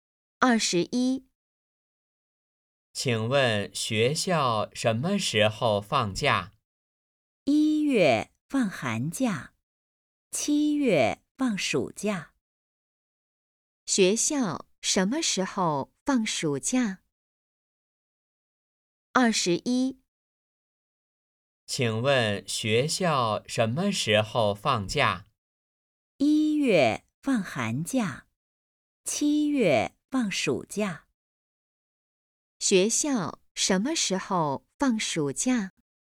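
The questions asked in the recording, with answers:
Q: 学校什么时候放暑假?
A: 七月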